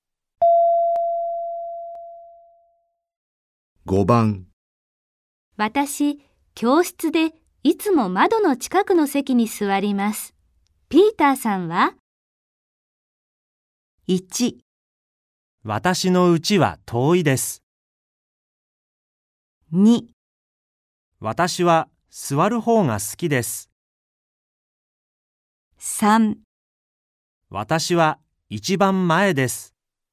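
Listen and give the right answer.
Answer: 3: 私は一番前です。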